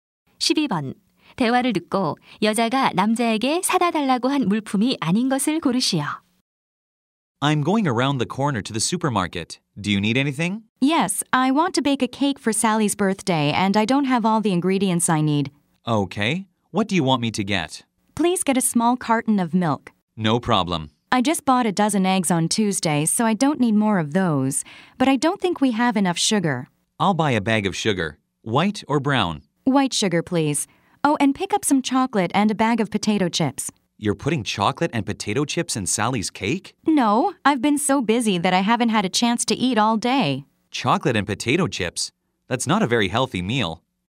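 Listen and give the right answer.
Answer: 달걀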